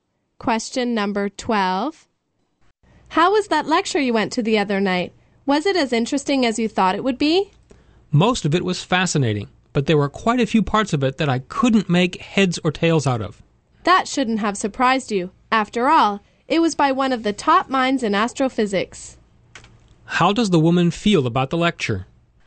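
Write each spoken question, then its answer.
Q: How does the woman feel about the lecture?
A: She found most of it fascinating, but parts were too hard to understand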